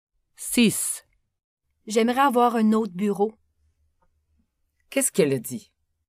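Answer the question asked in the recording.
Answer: Elle a dit qu'elle aimerait avoir un autre bureau.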